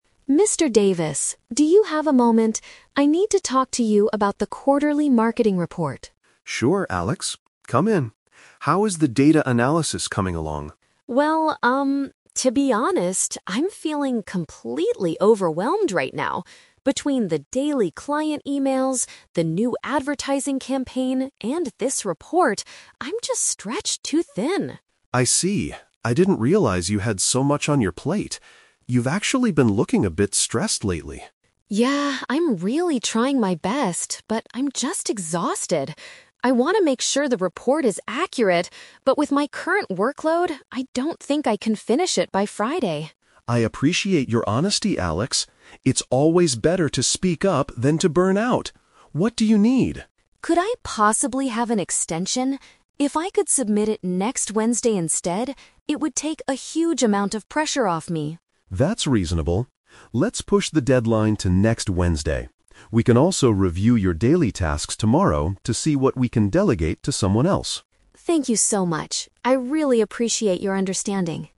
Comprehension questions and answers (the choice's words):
Listen to the conversation between an employee and a manager. Choose the correct answer (A, B, or C) for each question.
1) What is the main reason Alex wants to speak with his manager?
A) He wants to complain about communicating with a difficult client.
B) He is feeling very stressed because he has too many things to do.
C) He wants to apply for a different position in the advertising team.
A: He is feeling very stressed because he has too many things to do.

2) What is Alex's specific request regarding the marketing report?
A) He asks for more time to finish the work properly.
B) He wants another employee to do the data analysis.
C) He suggests canceling the report because the data is inaccurate.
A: He asks for more time to finish the work properly.

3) How does Mr. Davis react to Alex's situation?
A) He tells Alex to finish the report by Friday before taking a break.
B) He is disappointed that Alex waited so long to ask for help.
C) He agrees to change the deadline and offers to reduce Alex's daily tasks.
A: He agrees to change the deadline and offers to reduce Alex's daily tasks.

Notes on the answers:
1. The Key: Alex says he is feeling "completely overwhelmed" and "stretched too thin" because of client emails, campaigns, and the report. This perfectly matches "stressed because he has too many things to do." The Trap (A): The audio mentions "client emails", but Alex doesn't say the clients are difficult; he is just tired of the volume of work. The Trap (C): The phrase "advertising campaign" is mentioned, but he is working on it, not applying for a new job.
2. The Key: Alex asks, "Could I possibly have an extension?" and wants to submit it next Wednesday instead of Friday. "Have an extension" is a paraphrase for asking for more time. The Trap (B): Mr. Davis mentions at the end that they can "delegate to someone else," but that is about Alex's daily tasks, not the data analysis for the report. The Trap (C): Alex mentions he wants to make the report "accurate," not that it is currently inaccurate or should be canceled.
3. The Key: Mr. Davis says, "Let's push the deadline to next Wednesday" (change the deadline) and "see what we can delegate to someone else" (reduce his tasks). The Trap (A): Friday was the original deadline, but Mr. Davis agrees to push it to Wednesday. He does not force Alex to finish it by Friday. The Plausible (B): In the real world, managers might be upset, but Mr. Davis is very supportive and says, "I appreciate your honesty."

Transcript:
Alex: Mr. Davis, do you have a moment? I need to talk to you about the quarterly marketing report.
Mr. Davis: Sure, Alex. Come in. How is the data analysis coming along?
to be honest, I'm feeling completely overwhelmed right now. Between the daily client emails, the new advertising campaign, and this report, I'm just stretched too thin.
Mr. Davis: I see. I didn't realize you had so much on your plate. You've actually been looking a bit stressed lately.
Alex: Yeah, I'm really trying my best, but I'm just exhausted. I want to make sure the report is accurate, but with my current workload, I don't think I can finish it by Friday.
Mr. Davis: I appreciate your honesty, Alex. It's always better to speak up than to burn out. What do you need?
Alex: Could I possibly have an extension? If I could submit it next Wednesday instead, it would take a huge amount of pressure off me.
Mr. Davis: That's reasonable. Let's push the deadline to next Wednesday. We can also review your daily tasks tomorrow to see what we can delegate to someone else.